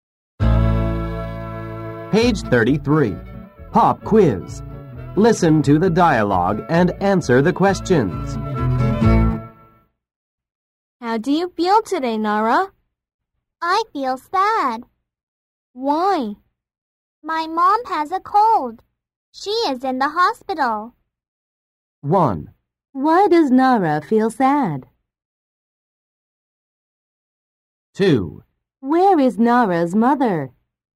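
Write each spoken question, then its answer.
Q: Why does Nara feel sad?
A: Because her mom has a cold and is in the hospital.

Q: Where is Nara's mother?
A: In the hospital.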